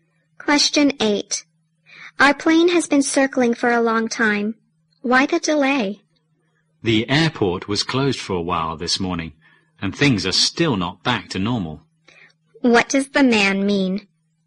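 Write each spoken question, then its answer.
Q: What does the man mean?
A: The airport was closed for a while and things aren't back to normal yet.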